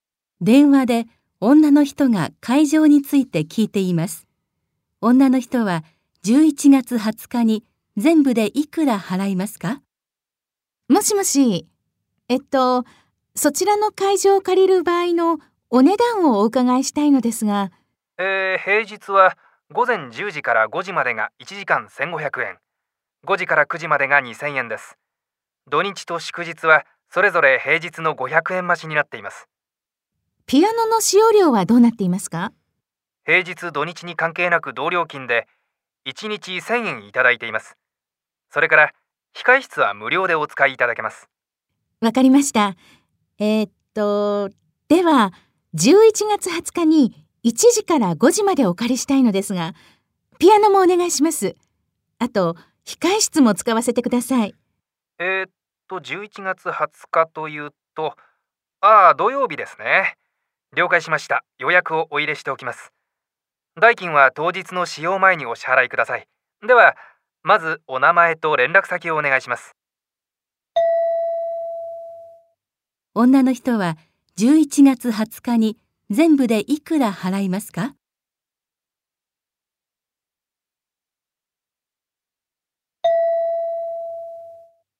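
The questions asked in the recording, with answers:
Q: 女の人は11月20日に全部でいくら払いますか?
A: 9000円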